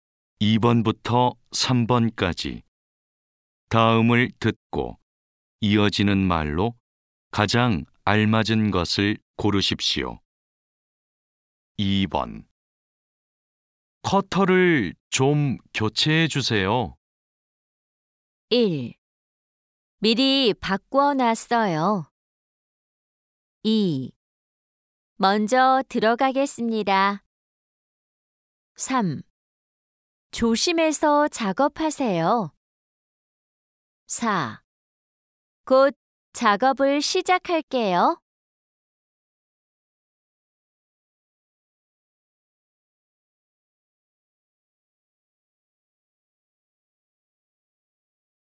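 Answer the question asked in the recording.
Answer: 1: 미리 바꿔놨어요.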